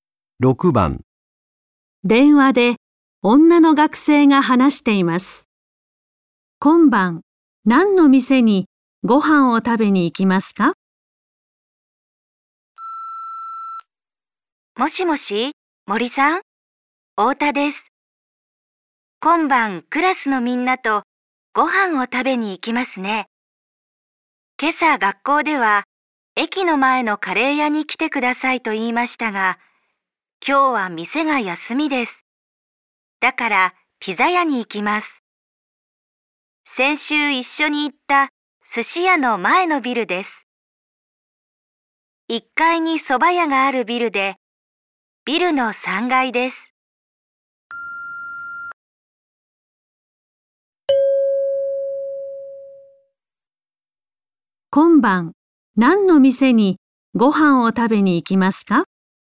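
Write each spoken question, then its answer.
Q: 今晩、何の店にご飯を食べに行きますか?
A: ピザ屋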